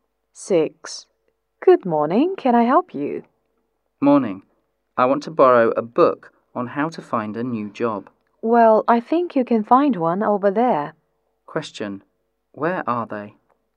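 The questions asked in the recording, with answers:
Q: Where are they?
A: In a library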